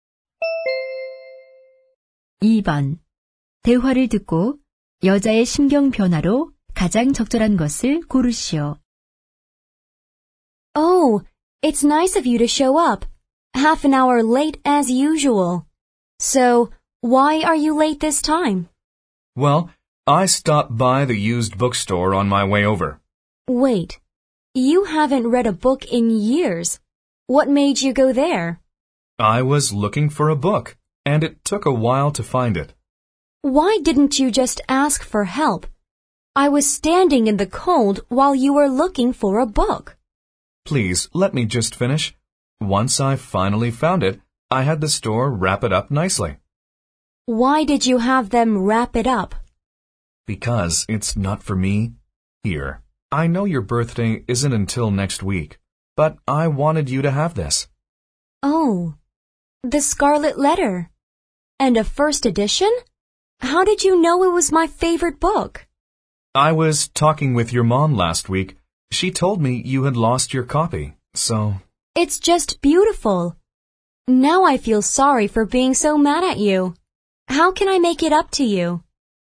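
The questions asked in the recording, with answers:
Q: 대화를 듣고 여자의 심경 변화로 가장 적절한 것을 고르시오.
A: 짜증남 → 미안하고 감동함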